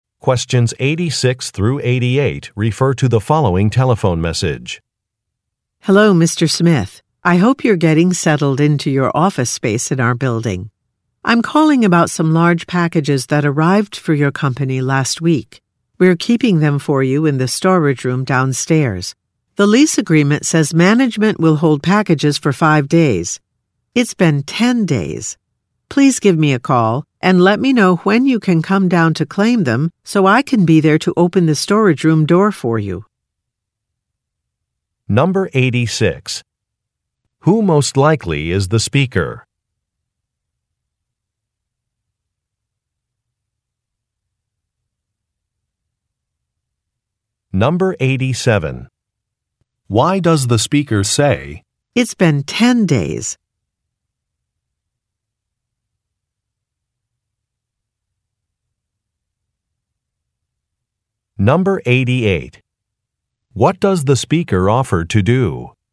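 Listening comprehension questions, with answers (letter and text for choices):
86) Who most likely is the speaker?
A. A salesperson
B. A government official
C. An interior designer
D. A building manager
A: D. A building manager

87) Why does the speaker say, "It's been ten days"?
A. To explain an expense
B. To point out a problem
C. To make an offer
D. To thank a colleague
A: B. To point out a problem

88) What does the speaker offer to do?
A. Open the door to a room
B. Reset a password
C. Send a copy of a document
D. Refund a payment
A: A. Open the door to a room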